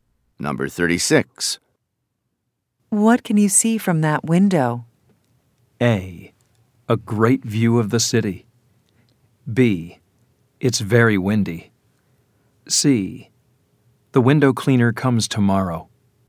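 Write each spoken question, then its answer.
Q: What can you see from that window?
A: A: A great view of the city.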